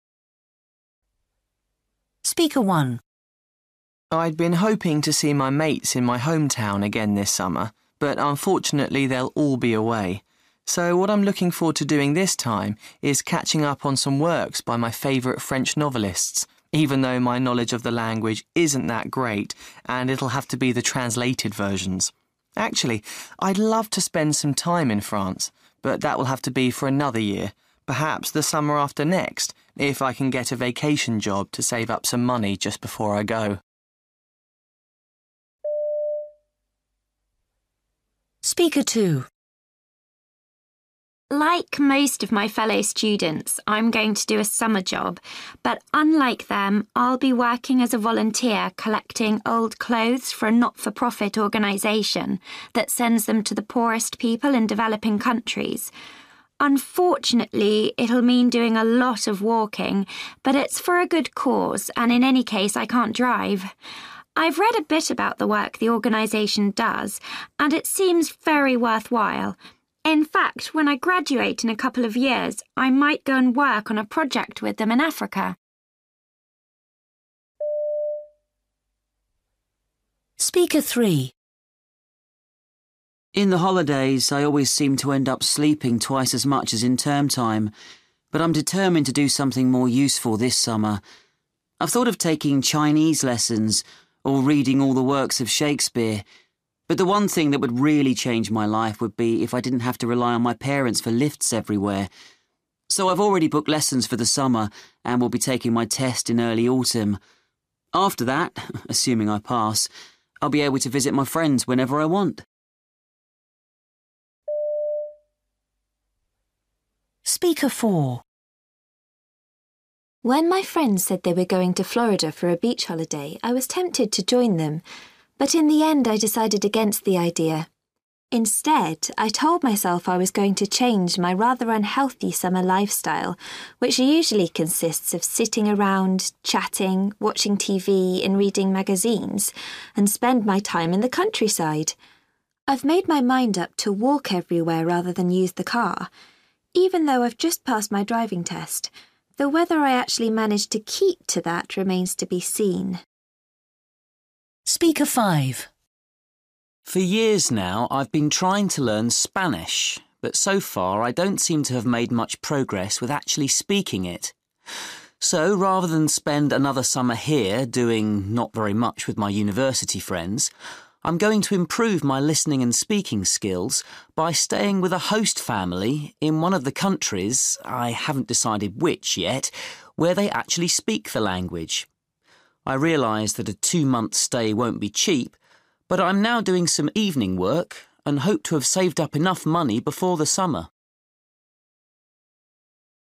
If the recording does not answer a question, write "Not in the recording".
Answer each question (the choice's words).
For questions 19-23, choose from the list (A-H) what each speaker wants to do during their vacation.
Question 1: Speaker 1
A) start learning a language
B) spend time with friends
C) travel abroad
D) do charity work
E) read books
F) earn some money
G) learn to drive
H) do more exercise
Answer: read books

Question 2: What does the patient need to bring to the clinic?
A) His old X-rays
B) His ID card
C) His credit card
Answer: Not in the recording

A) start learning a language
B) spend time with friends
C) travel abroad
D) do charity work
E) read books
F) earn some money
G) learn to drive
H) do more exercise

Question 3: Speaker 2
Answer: do charity work

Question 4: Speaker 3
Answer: learn to drive

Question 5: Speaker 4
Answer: do more exercise

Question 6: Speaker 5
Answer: travel abroad

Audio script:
I'd been hoping to see my mates in my home town again this summer, but unfortunately they'll all be away. So what I'm looking forward to doing this time is catching up on some works by my favourite French novelists, even though my knowledge of the language isn't that great and it'll have to be the translated versions. Actually, I'd love to spend some time in France, but that will have to be for another year – perhaps the summer after next if I can get a vacation job to save up some money just before I go.
Like most of my fellow students I'm going to do a summer job, but unlike them I'll be working as a volunteer, collecting old clothes for a not-for-profit organisation that sends them to the poorest people in developing countries. Unfortunately it'll mean doing a lot of walking, but it's for a good cause and in any case I can't drive. I've read a bit about the work the organisation does and it seems very worthwhile. In fact, when I graduate in a couple of years I might go and work on a project with them in Africa.
In the holidays, I always seem to end up sleeping twice as much as in term time, but I'm determined to do something more useful this summer. I've thought of taking Chinese lessons, or reading all the works of Shakespeare, but the one thing that would really change my life would be if I didn't have to rely on my parents for lifts everywhere. So I've already booked lessons for the summer, and will be taking my test in early autumn. After that, assuming I pass, I'll be able to visit my friends whenever I want.
When my friends said they were going to Florida for a beach holiday I was tempted to join them, but in the end I decided against the idea. Instead, I told myself I was going to change my rather unhealthy summer lifestyle, which usually consists of sitting around chatting, watching TV and reading magazines, and spend my time in the countryside. I've made my mind up to walk everywhere rather than use the car, even though I've just passed my driving test, though whether I actually manage to keep to that remains to be seen.
For years now, I've been trying to learn Spanish, but so far I don't seem to have made much progress with actually speaking it. So rather than spend another summer here doing not very much with my university friends, I'm going to improve my listening and speaking skills by staying with a host family in one of the countries – I haven't decided which, yet – where they actually speak the language. I realise that a two-month stay won't be cheap, but I'm now doing some evening work and hope to have saved up enough money before the summer.